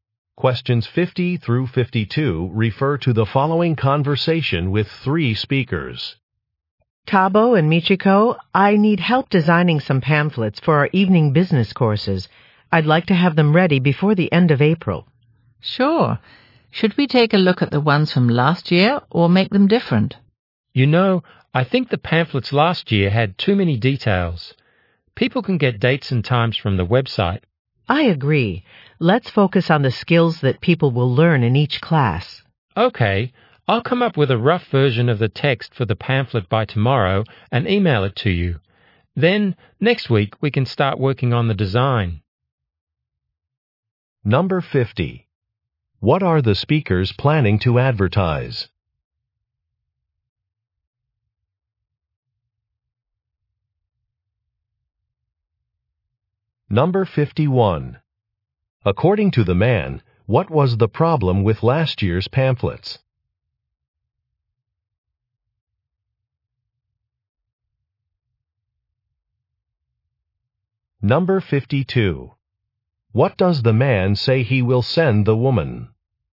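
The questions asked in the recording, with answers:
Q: What are the speakers planning to advertise?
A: Evening business courses

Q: According to the man, what was the problem with last year's pamphlets?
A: They had too many details

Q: What does the man say he will send the woman?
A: A rough version of the pamphlet text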